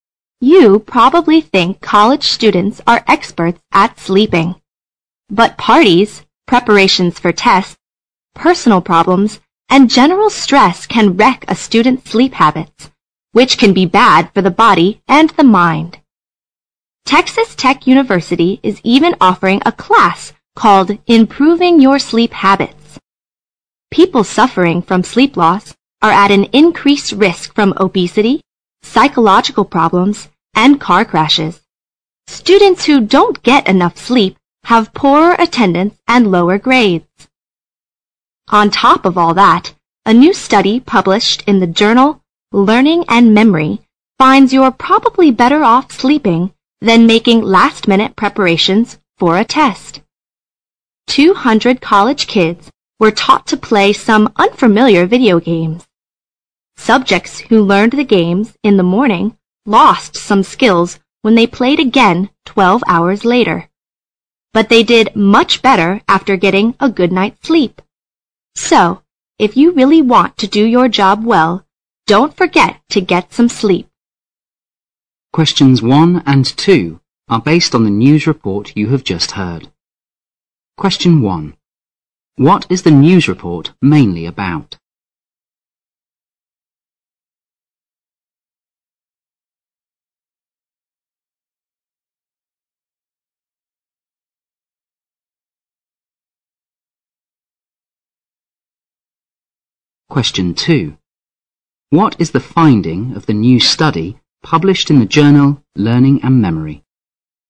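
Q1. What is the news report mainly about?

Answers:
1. The importance of sleep for college students

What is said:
You probably think college students are experts at sleeping. But parties, preparations for tests, personal problems and general stress can wreck a student's sleep habits, which can be bad for the body and the mind. Texas Tech University is even offering a class called "Improving Your Sleep Habits". People suffering from sleep loss are adding increased risk from obesity, psychological problems and car crashes. Students who don't get enough sleep have poorer attendance and lower grades. On top of all that, a new study published in the journal Learning & Memory finds you are probably better off sleeping than making last-minute preparations for a test. Two hundred college kids were taught to play some unfamiliar video games. Subjects who learned the games in the morning lost some skills when they played again 12 hours later, but they did much better after getting a good night sleep. 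So, if you really want to do your job well, don't forget to get some sleep.
Question 1. What is the news report mainly about?
Question 2.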